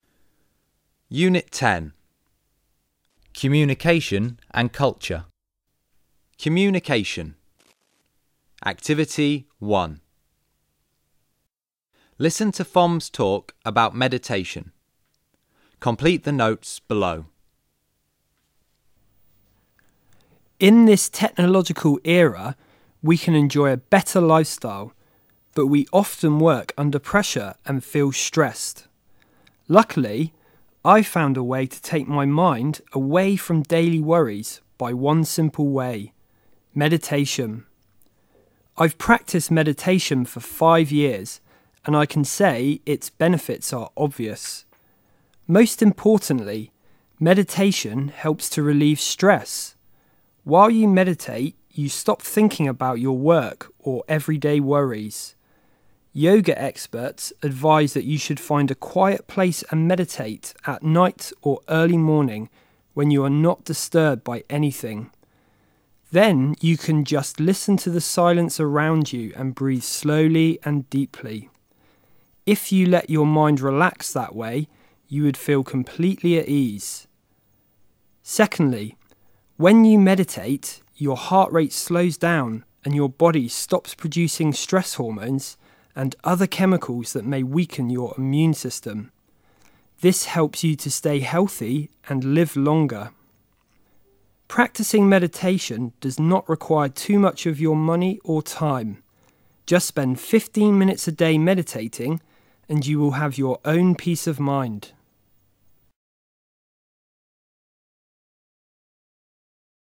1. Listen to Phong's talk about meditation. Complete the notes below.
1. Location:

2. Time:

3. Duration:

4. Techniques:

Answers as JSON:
{"1": "at a quiet place", "2": "at night or early morning.", "3": "15minutes / a day", "4": "Listen to the silence around you and breathe slowly and deeply."}

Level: Lớp 11